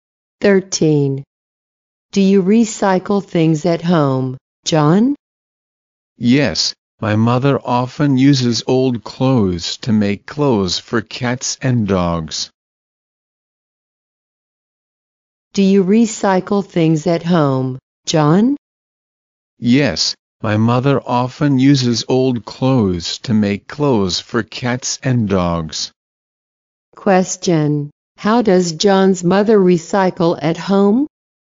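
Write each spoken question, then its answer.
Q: Question: How does John's mother recycle at home?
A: She uses old clothes to make clothes for cats and dogs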